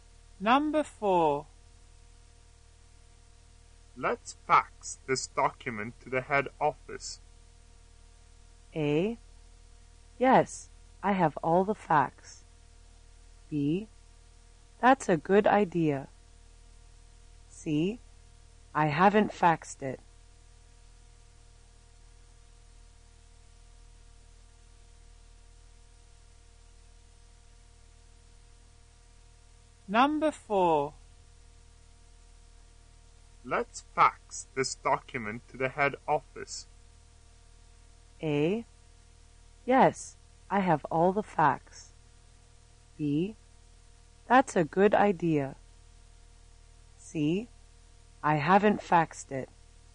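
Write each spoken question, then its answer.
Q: Let's fax this document to the head office.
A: B: That's a good idea.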